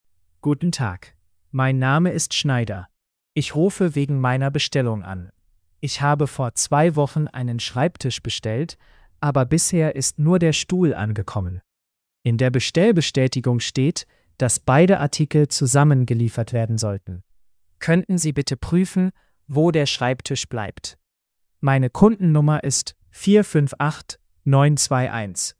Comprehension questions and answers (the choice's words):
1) Warum ruft Herr Schneider an?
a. Er möchte einen Stuhl zurückgeben.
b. Der Schreibtisch wurde noch nicht geliefert.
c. Er möchte eine neue Bestellung aufgeben.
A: Der Schreibtisch wurde noch nicht geliefert.

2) Was ist angekommen?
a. nur der Stuhl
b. nur der Schreibtisch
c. beide Artikel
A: nur der Stuhl

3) Welche Kundennummer nennt er?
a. 458921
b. 459821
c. 485921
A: 458921

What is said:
Guten Tag, mein Name ist Schneider. Ich rufe wegen meiner Bestellung an. Ich habe vor zwei Wochen einen Schreibtisch bestellt, aber bisher ist nur der Stuhl angekommen. In der Bestellbestätigung steht, dass beide Artikel zusammen geliefert werden sollten. Könnten Sie bitte prüfen, wo der Schreibtisch bleibt? Meine Kundennummer ist 458921.

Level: B2-Niveau